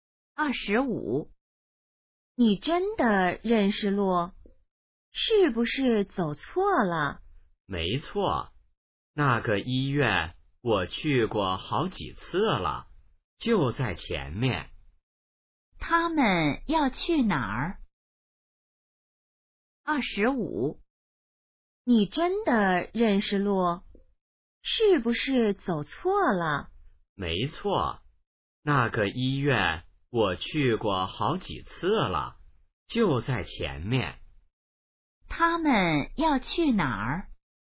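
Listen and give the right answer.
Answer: 医院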